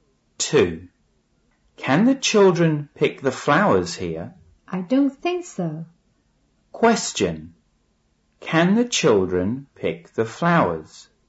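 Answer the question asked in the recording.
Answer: No, they can't.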